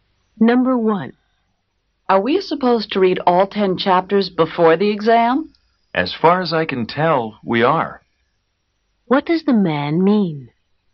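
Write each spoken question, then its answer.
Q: What does the man mean?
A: He thinks they must read all 10 chapters, but he isn't sure.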